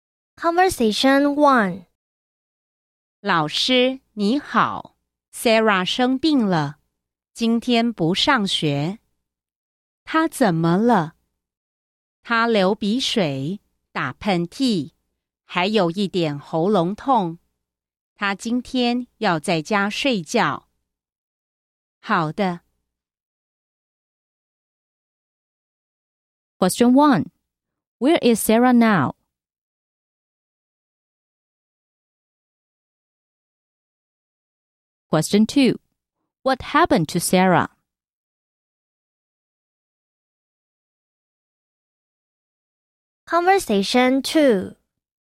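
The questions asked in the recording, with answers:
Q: Where is Sarah now?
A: At home

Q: What happened to Sarah?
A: She is sick: runny nose, sneezing, and a slightly sore throat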